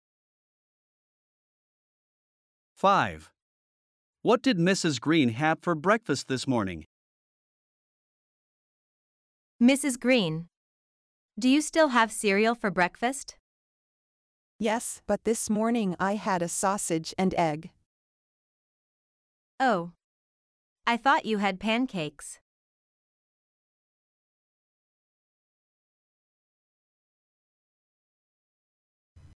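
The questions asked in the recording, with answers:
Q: What did Mrs. Green have for breakfast this morning?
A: A sausage and egg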